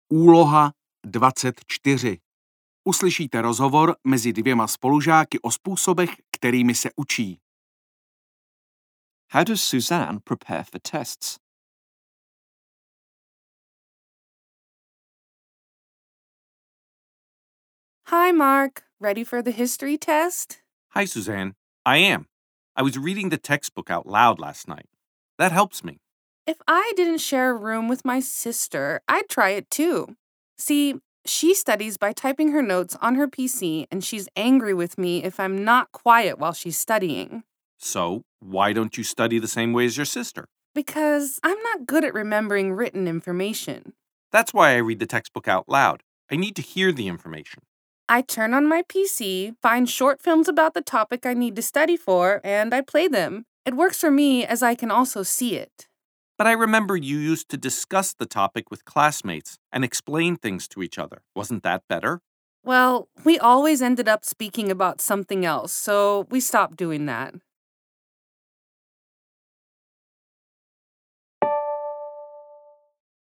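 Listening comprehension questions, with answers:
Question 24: How does Susanne prepare for tests?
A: by watching short films on her PC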